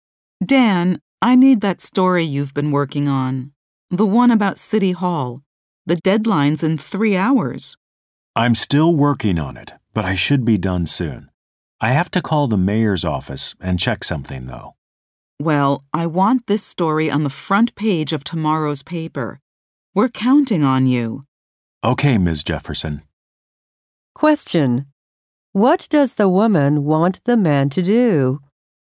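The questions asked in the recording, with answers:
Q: What does the woman want the man to do?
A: Finish his story about City Hall before the deadline in 3 hours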